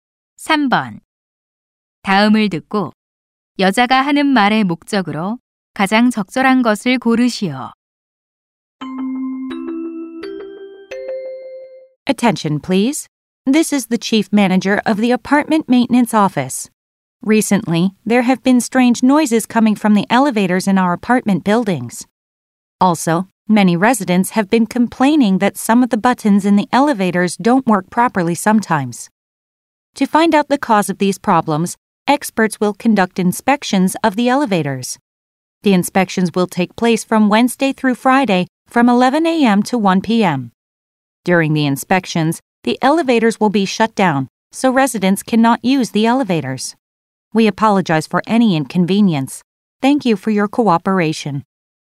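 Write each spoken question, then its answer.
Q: 다음을 듣고 여자가 하는 말의 목적으로 가장 적절한 것을 고르시오.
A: 엘리베이터 점검 일정과 점검 중 사용 중단을 알리려고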